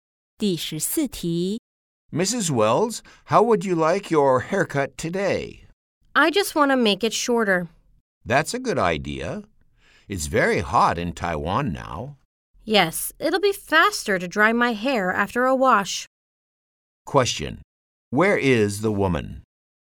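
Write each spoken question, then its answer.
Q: Where is the woman?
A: At a hair salon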